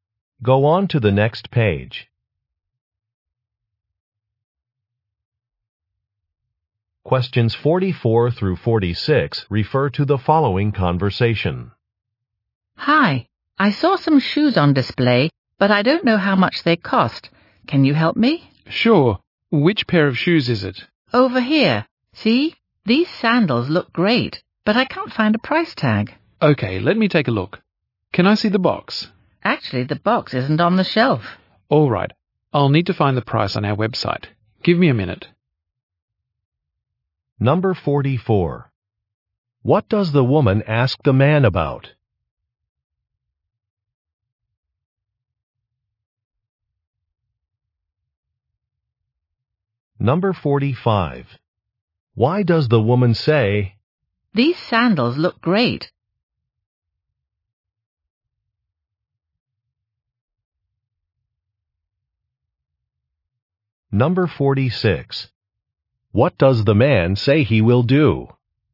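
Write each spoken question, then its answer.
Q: What does the woman ask the man about?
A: The price of some shoes

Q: What does the man say he will do?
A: Look up the price on the website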